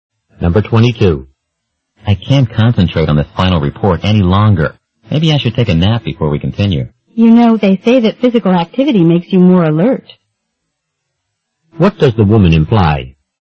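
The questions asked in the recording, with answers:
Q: What does the woman imply?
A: The man should do some exercise instead of napping.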